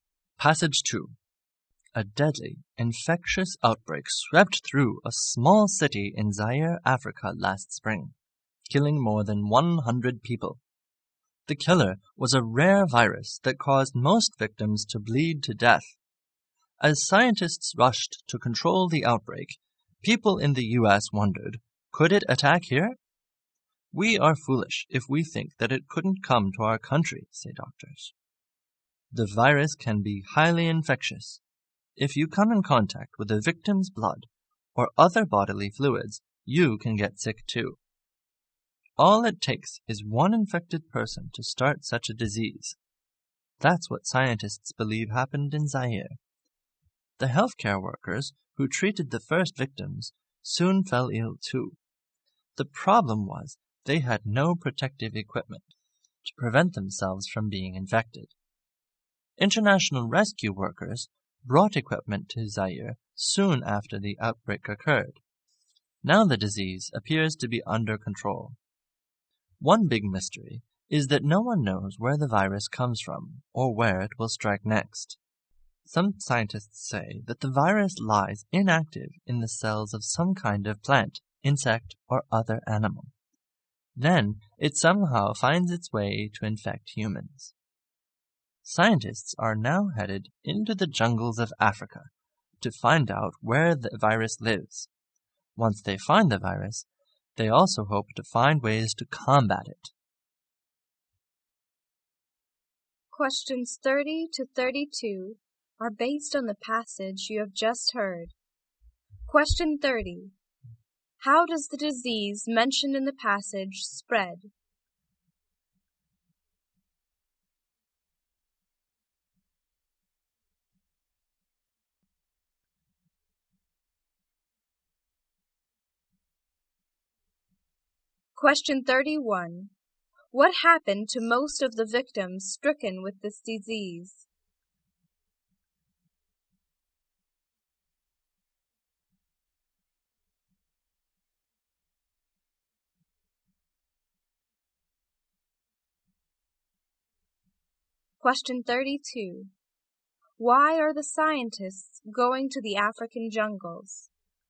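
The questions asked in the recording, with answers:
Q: How does the disease mentioned in the passage spread?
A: Through contact with a victim's blood or other bodily fluids.

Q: What happened to most of the victims stricken with this disease?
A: They bled to death.

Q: Why are the scientists going to the African jungles?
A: To find out where the virus lives.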